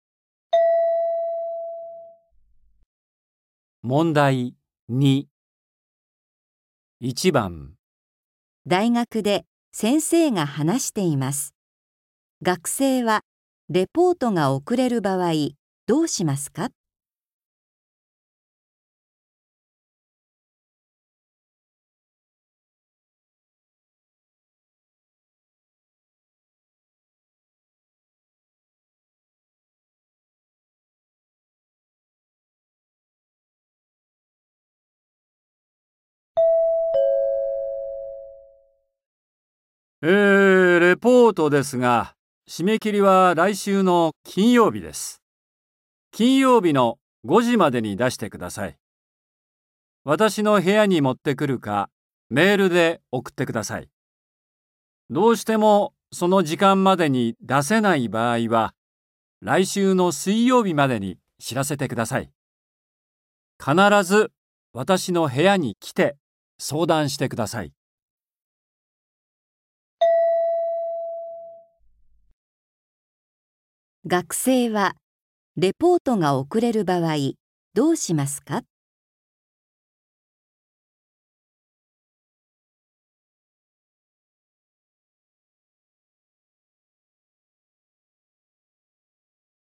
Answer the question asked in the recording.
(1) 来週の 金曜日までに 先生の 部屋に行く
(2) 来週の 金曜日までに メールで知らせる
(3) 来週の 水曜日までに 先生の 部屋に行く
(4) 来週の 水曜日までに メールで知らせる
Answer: (3) 来週の 水曜日までに 先生の 部屋に行く

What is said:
大学で先生が話しています。学生は、レポートが遅れる場合、どうしますか。
M:えー、レポートですが、締め切りは来週の金曜日です。金曜日の5時までに
私の部屋に持ってくるか、メールで送ってください。どうしてもその時間までに出せない場合は、来週の水曜日までに知らせてください。必ず、私の部屋に来て、相談してください。

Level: 初級